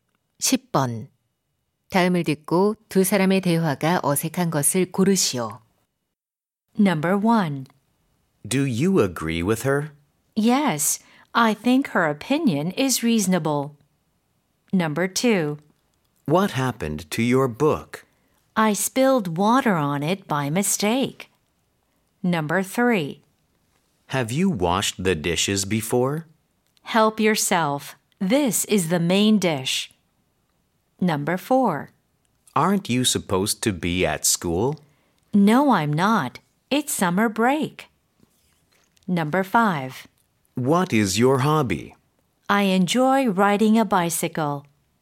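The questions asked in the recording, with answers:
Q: 다음을 듣고 두 사람의 대화가 어색한 것을 고르시오.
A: 3: Have you washed the dishes before? / Help yourself. This is the main dish.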